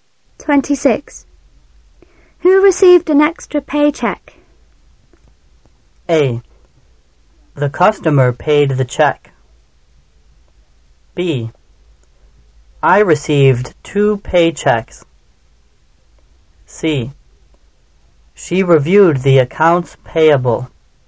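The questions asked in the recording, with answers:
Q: Who received an extra paycheck?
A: B: I received 2 paychecks.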